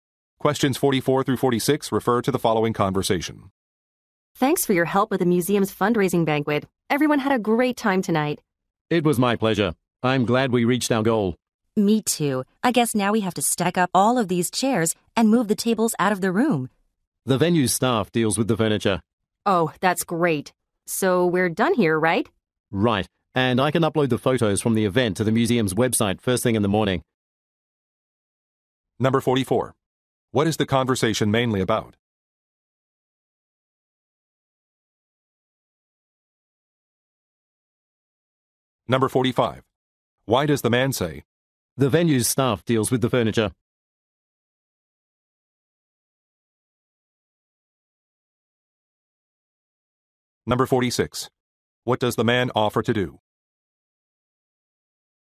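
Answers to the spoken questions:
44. A museum fundraising banquet
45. To say they don't need to move the chairs and tables themselves
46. Upload the event photos to the museum's website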